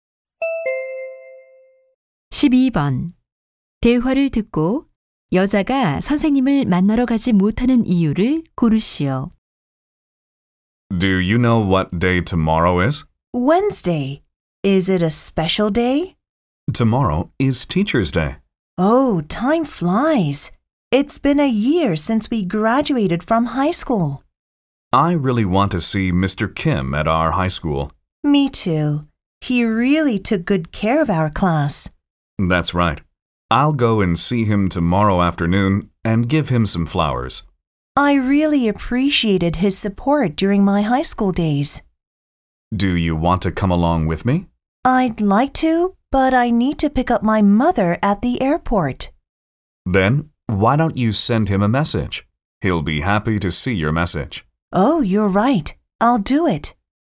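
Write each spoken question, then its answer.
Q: 대화를 듣고 여자가 선생님을 만나러 가지 못하는 이유를 고르시오.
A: 공항에 어머니를 마중 나가야 해서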